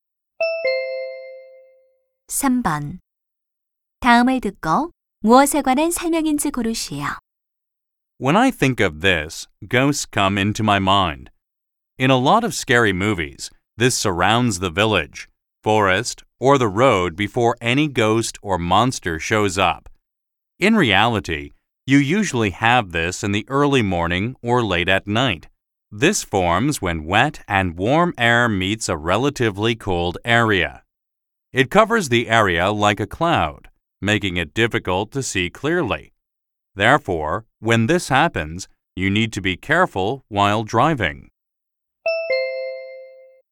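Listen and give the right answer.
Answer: 안개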